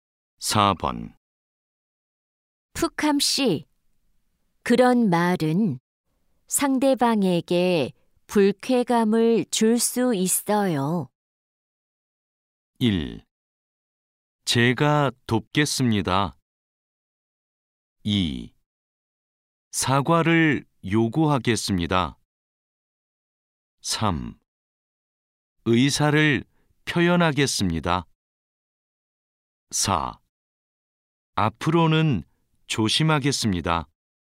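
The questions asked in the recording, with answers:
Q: 푸캄 씨, 그런 말은 상대방에게 불쾌감을 줄 수 있어요.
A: 4: 앞으로는 조심하겠습니다.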